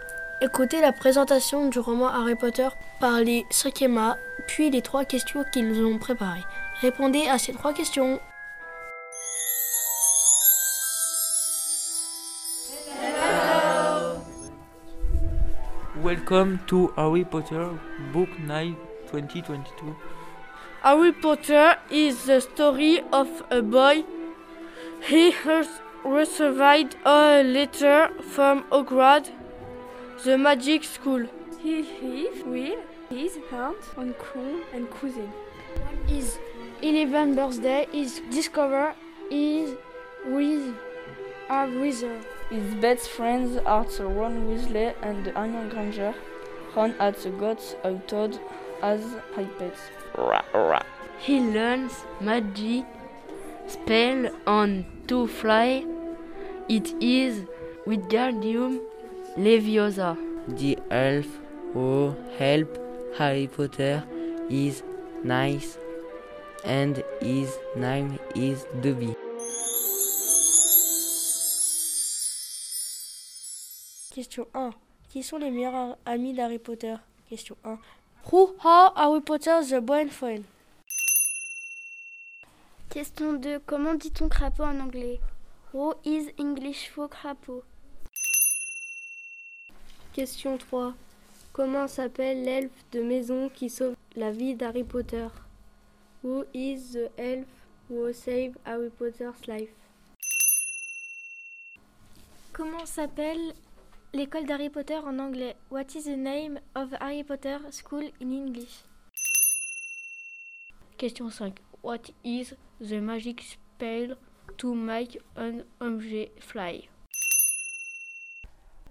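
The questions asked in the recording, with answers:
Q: Qui sont les meilleurs amis d'Harry Potter?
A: Ron Weasley et Hermione Granger

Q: Comment s'appelle l'elfe de maison qui sauve la vie d'Harry Potter?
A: Dobby

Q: Comment s'appelle l'école d'Harry Potter en anglais?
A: Hogwarts

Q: What is the magic spell to make an object fly?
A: Wingardium Leviosa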